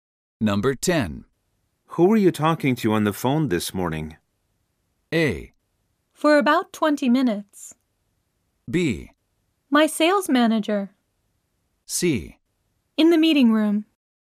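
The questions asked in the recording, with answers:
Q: Who were you talking to on the phone this morning?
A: B: My sales manager.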